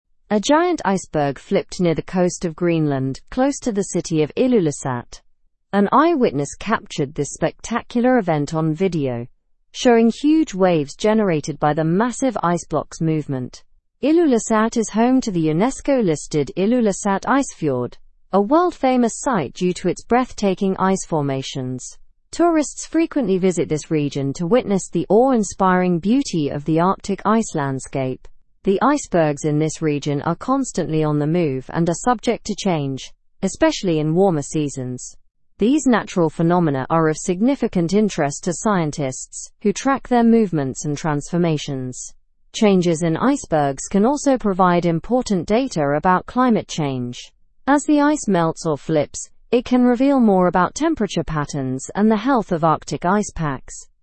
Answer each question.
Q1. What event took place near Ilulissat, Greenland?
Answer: An iceberg flipped near the coast.

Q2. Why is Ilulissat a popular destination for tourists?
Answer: It is known for its stunning ice formations and landscapes.

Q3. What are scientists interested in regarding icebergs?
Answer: Scientists track movements and transformations of icebergs.

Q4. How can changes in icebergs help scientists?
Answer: They provide important data about climate change and temperature patterns.

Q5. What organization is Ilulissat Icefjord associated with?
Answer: It's associated with UNESCO as a world heritage site.

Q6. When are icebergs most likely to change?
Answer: They change especially during the warmer seasons.

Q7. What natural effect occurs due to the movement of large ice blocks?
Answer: Huge waves are created by their movement.

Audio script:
A giant iceberg flipped near the coast of Greenland, close to the city of Ilulissat. An eyewitness captured this spectacular event on video, showing huge waves generated by the massive ice block's movement. Ilulissat is home to the UNESCO-listed Ilulissat Icefjord, a world-famous site due to its breathtaking ice formations. Tourists frequently visit this region to witness the awe-inspiring beauty of the Arctic ice landscape. The icebergs in this region are constantly on the move and are subject to change, especially in warmer seasons. These natural phenomena are of significant interest to scientists, who track their movements and transformations. Changes in icebergs can also provide important data about climate change. As the ice melts or flips, it can reveal more about temperature patterns and the health of Arctic ice packs.

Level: Level 3